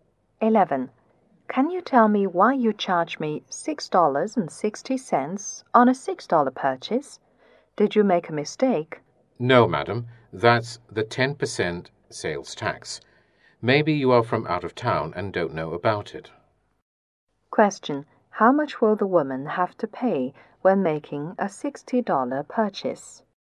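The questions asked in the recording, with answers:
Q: How much will the woman have to pay when making a $60 purchase?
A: $66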